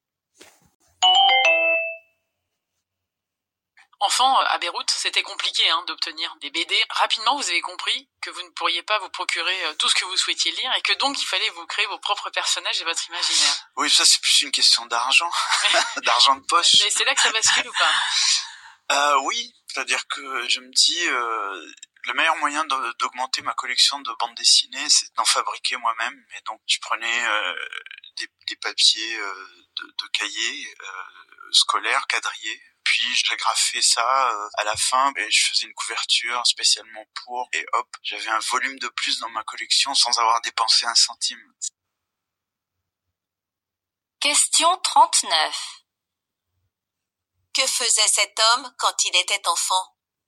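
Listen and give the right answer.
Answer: Il fabriquait ses propres bandes dessinées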